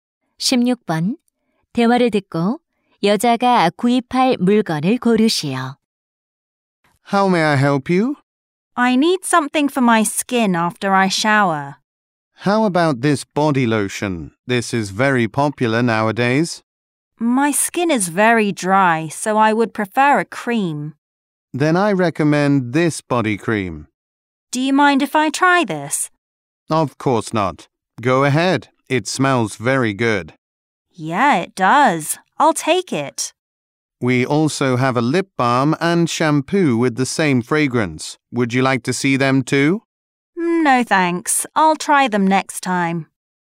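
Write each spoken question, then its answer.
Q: 대화를 듣고 여자가 구입할 물건을 고르시오.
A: 바디 크림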